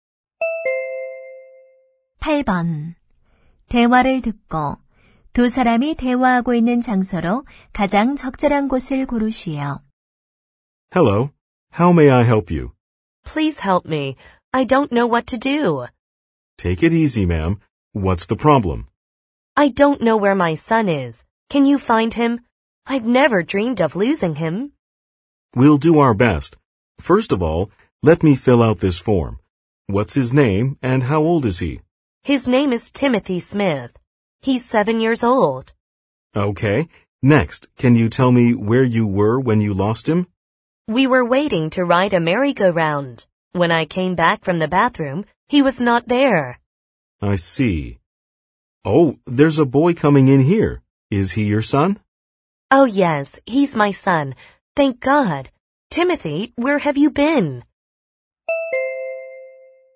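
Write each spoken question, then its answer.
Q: 대화를 듣고 두 사람이 대화하고 있는 장소로 가장 적절한 곳을 고르시오.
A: 놀이공원 미아보호소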